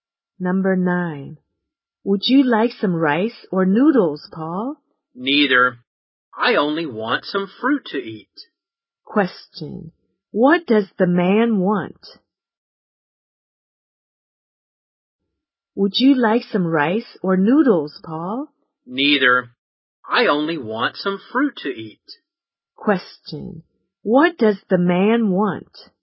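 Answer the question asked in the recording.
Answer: Some fruit.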